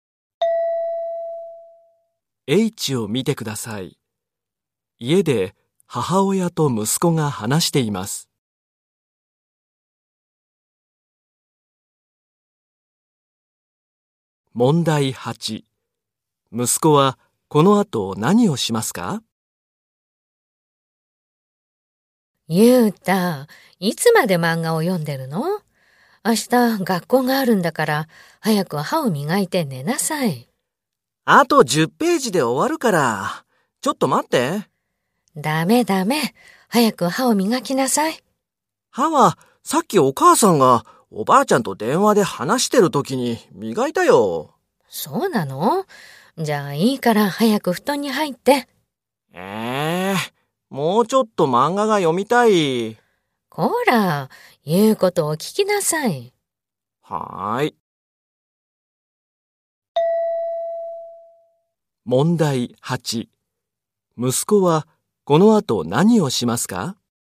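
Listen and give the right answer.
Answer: 布団に入って寝る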